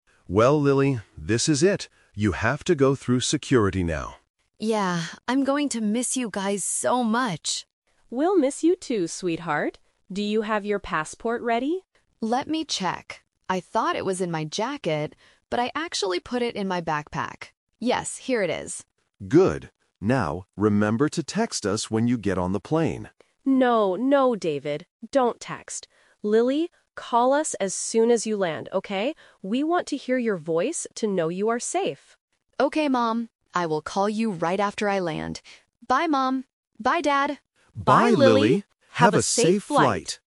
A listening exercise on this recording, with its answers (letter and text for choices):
Listen to the conversation between Lily and her parents at the airport and choose the correct answer (A, B, or C).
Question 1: Where is Lily's passport?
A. In her jacket.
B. In her backpack.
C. In her suitcase.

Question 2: What did Dad want Lily to do?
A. Text them on the plane.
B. Call them when she lands.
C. Sleep on the flight.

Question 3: What will Lily do to contact her parents?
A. She will text them from the plane.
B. She will send an email from the airport.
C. She will call them after she lands.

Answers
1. B. In her backpack.
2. A. Text them on the plane.
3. C. She will call them after she lands.

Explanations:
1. Lily says, "I thought it was in my jacket, but I actually put it in my backpack." Option (A) is the trap because the jacket was her original thought, but she changed it using the word "but". Option (C) is not mentioned.
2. Dad specifically says, "remember to text us when you get on the plane." Option (B) is what the Mom wants, not the Dad. Option (C) is plausible for a flight but is never mentioned.
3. Mom changes Dad's plan (The Twist) by saying, "Don't text... call us as soon as you land." Lily agrees and says, "I will call you right after I land." Option (A) is the trap (Dad's rejected idea), and Option (B) is not mentioned.

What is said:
Dad: Well, Lily, this is it. You have to go through security now.
Lily: Yeah. I'm going to miss you guys so much!
Mom: We'll miss you too, sweetheart. Do you have your passport ready?
Lily: Let me check. I thought it was in my jacket, but I actually put it in my backpack. Yes, here it is.
Dad: Good. Now, remember to text us when you get on the plane.
Mom: No, no, David. Don't text. Lily, call us as soon as you land, okay? We want to hear your voice to know you are safe.
Lily: Okay, Mom. I will call you right after I land. Bye, Mom! Bye, Dad!